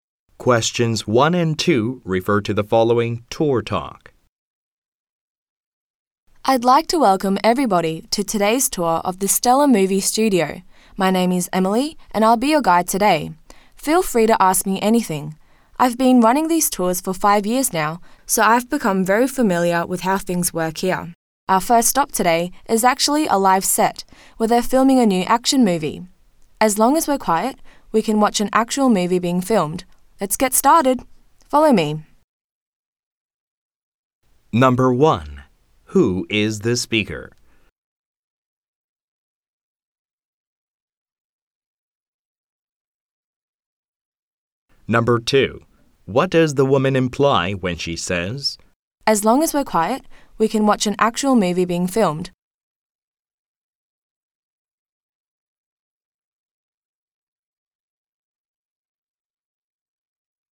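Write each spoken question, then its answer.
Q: Who is the speaker?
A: A tour guide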